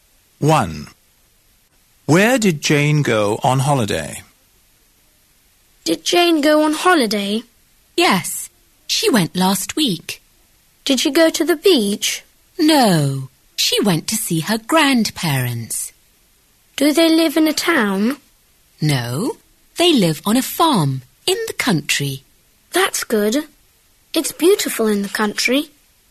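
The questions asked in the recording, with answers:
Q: Where did Jane go on holiday?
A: To her grandparents' farm in the country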